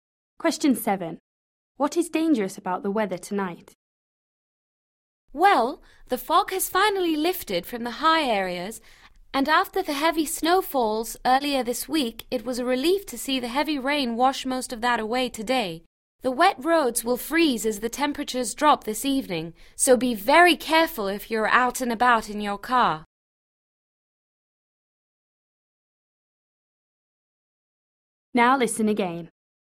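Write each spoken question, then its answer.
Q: What is dangerous about the weather tonight?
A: ice on the roads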